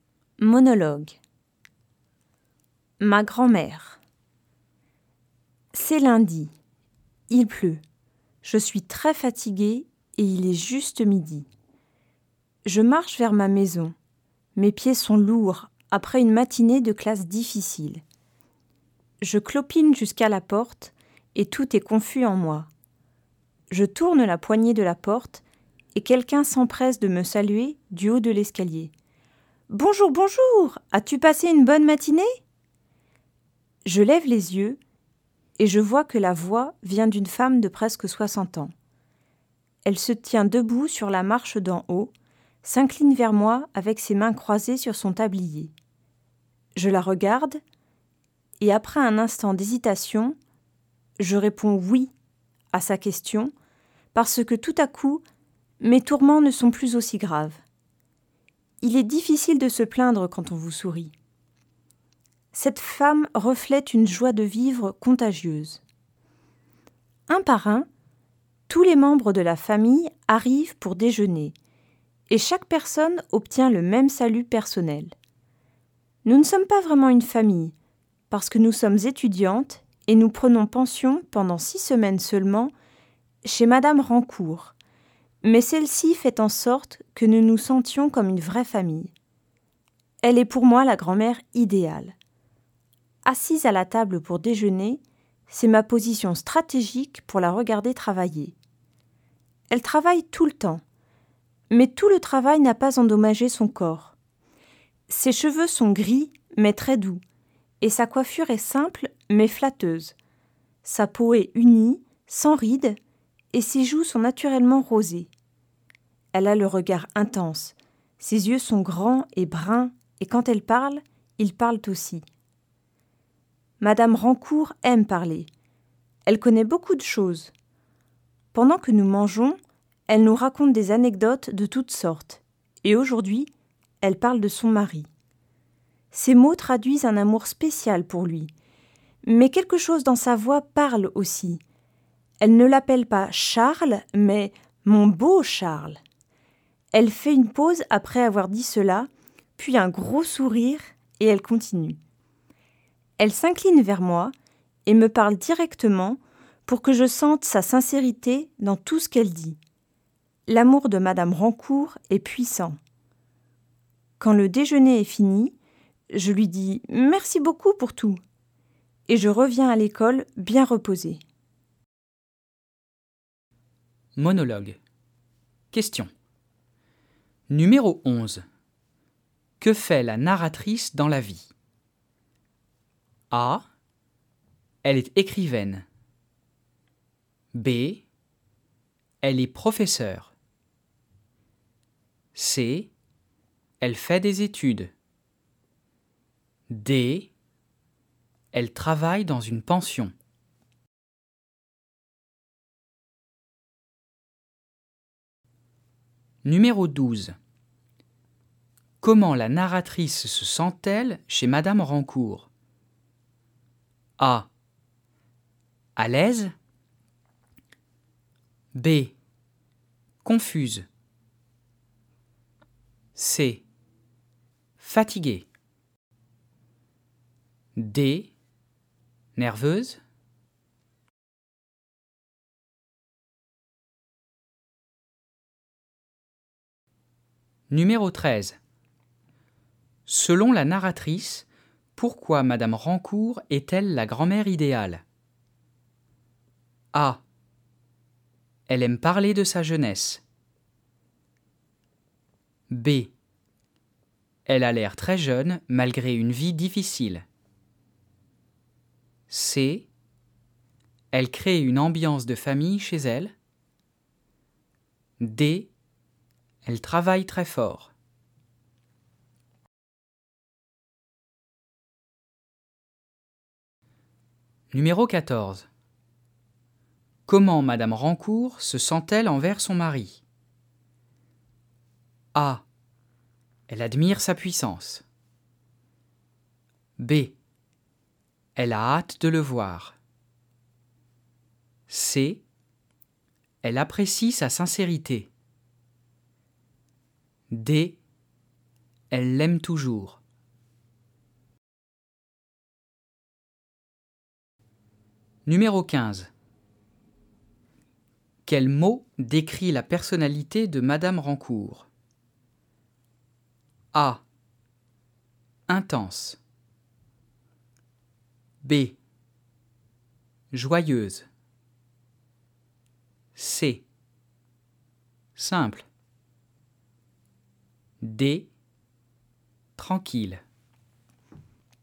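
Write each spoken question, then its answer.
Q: Que fait la narratrice dans la vie?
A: C: Elle fait des études.

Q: Comment la narratrice se sent-elle chez Madame Rancourt?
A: A: À l'aise.

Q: Selon la narratrice, pourquoi Madame Rancourt est-elle la grand-mère idéale?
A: C: Elle crée une ambiance de famille chez elle.

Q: Comment Madame Rancourt se sent-elle envers son mari?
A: D: Elle l'aime toujours.

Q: Quel mot décrit la personnalité de Madame Rancourt?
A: B: Joyeuse.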